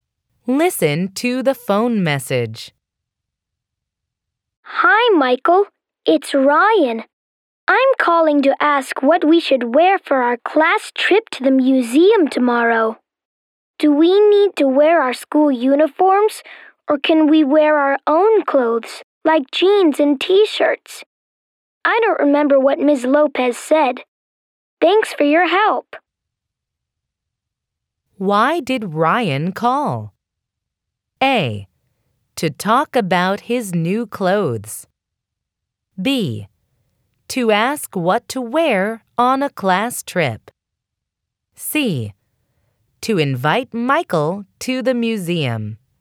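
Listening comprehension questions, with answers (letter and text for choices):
Why did Ryan call?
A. To talk about his new clothes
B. To ask what to wear on a class trip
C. To invite Michael to the museum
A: B. To ask what to wear on a class trip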